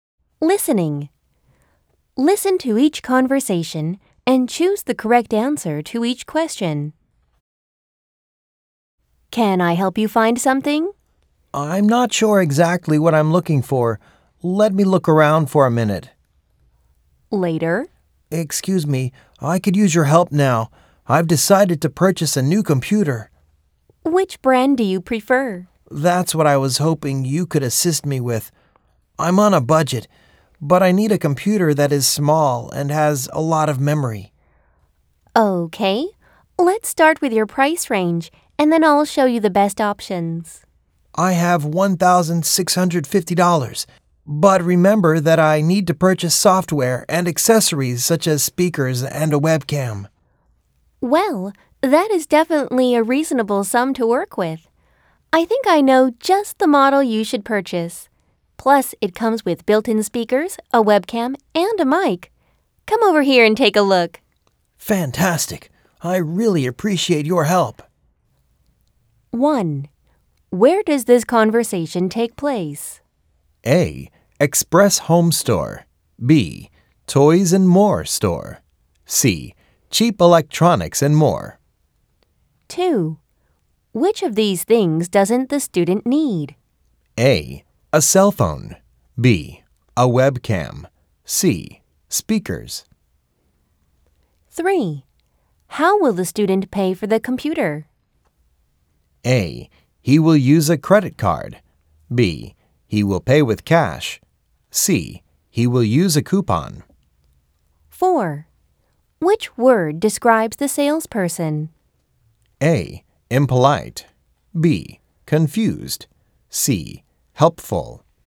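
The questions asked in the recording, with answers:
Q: Where does this conversation take place?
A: C: Cheap Electronics and More.

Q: Which of these things doesn't the student need?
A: A: A cell phone.

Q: Which word describes the salesperson?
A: C: Helpful.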